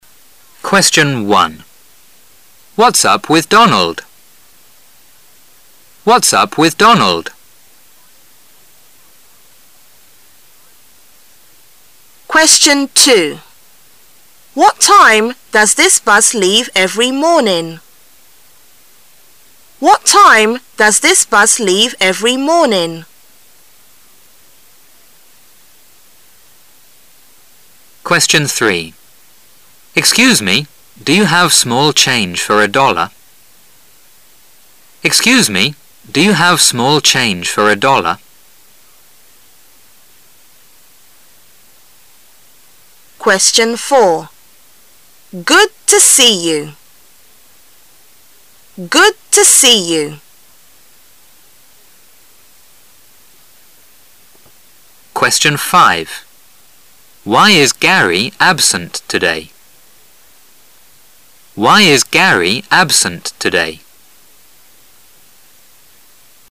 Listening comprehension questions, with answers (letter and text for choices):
Section A Directions: This section is to test your ability to give proper responses. There are 5 recorded questions in it. After each question there is a pause. The questions will be spoken two times. When you hear a question, you should decide on the correct answer from the 4 choices marked [A], [B], [C] and [D] given in your test paper. Then you should mark the corresponding letter on the Answer Sheet with a single line through the center.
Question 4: Good to see you.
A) Thanks.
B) Yes, it is wonderful time.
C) Fine. And you?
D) I'm glad to see you too.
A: D) I'm glad to see you too.

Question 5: Why is Gary absent today?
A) He is ok now.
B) He is ill.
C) He is coming tomorrow.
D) He is doing exercises.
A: B) He is ill.

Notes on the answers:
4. Good to see you意为"很高兴见到你",是见面时打招呼的典型用语,回答时一般说Good to see you,too.或Glad to see you,too.,表示"我也很高兴"。
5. 通过关键疑问词why,可知本题是询问原因的,是问为什么Gary今天没来,因此只有选项[B]He is ill符合题意。其它选项都不能作为他没来的原因。